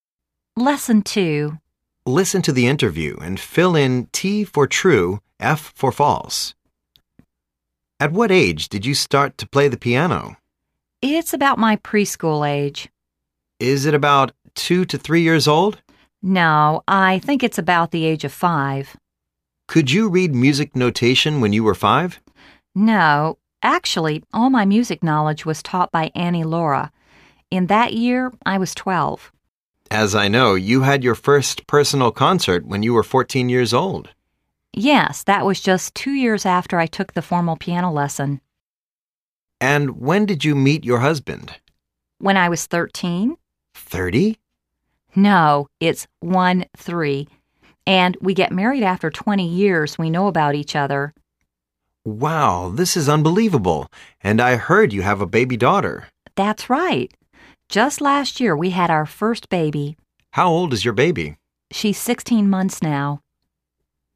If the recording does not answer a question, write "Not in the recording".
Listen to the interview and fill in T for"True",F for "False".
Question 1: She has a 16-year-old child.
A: F

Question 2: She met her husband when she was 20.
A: F

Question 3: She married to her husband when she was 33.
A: T

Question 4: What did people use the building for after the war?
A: Not in the recording

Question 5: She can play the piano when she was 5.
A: T

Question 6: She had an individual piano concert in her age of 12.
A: F